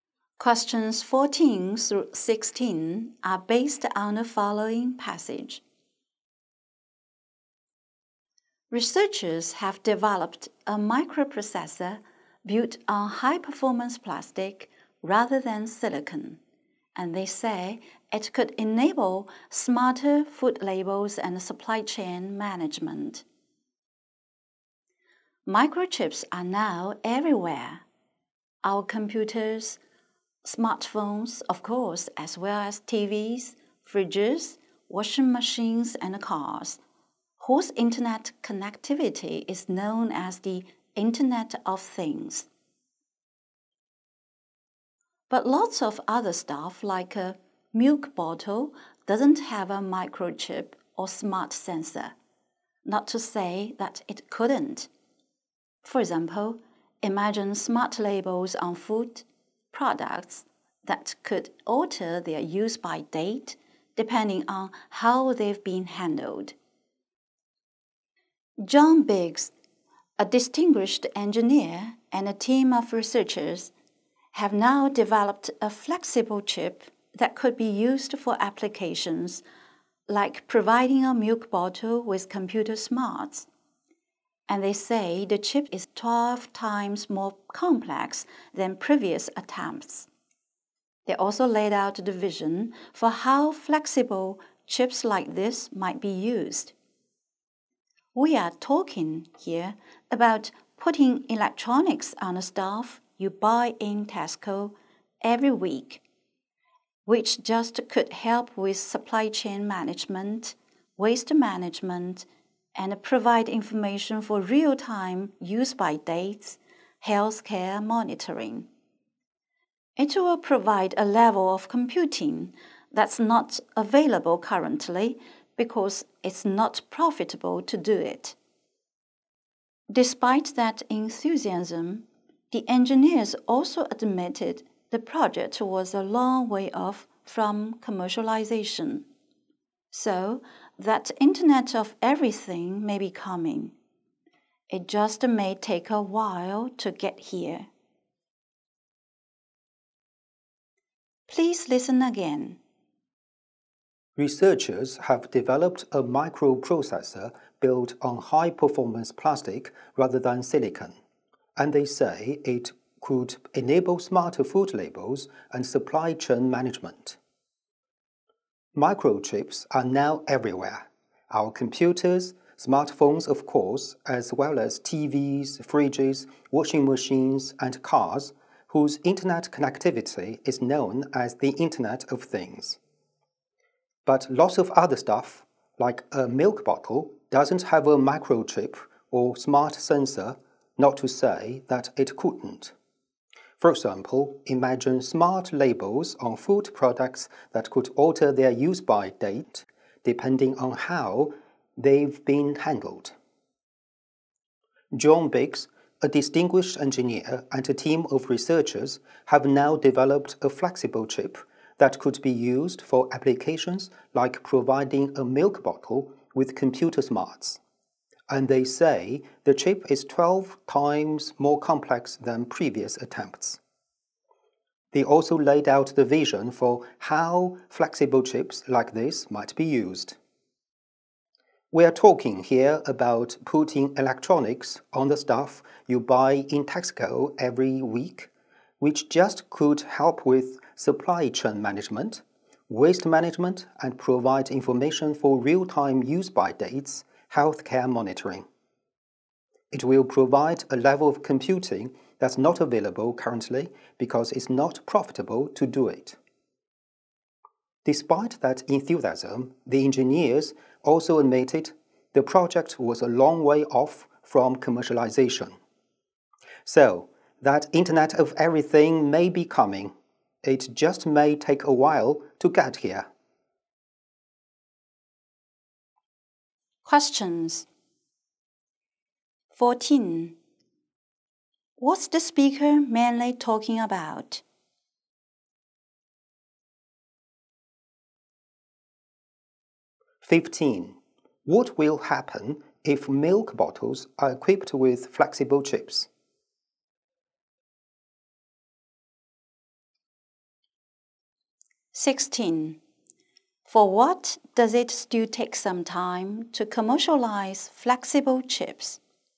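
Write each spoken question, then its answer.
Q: What's the speaker mainly talking about?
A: A flexible plastic microchip

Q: What will happen if milk bottles are equipped with flexible chips?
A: They could show real-time use-by dates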